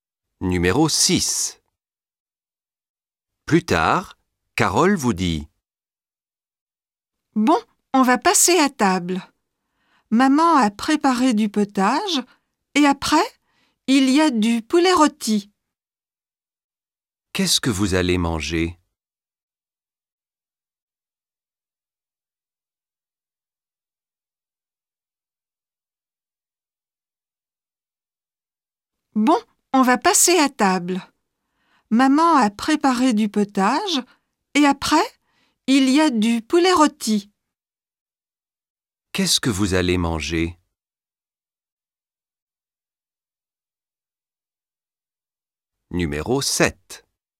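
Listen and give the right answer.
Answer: Du potage et du poulet rôti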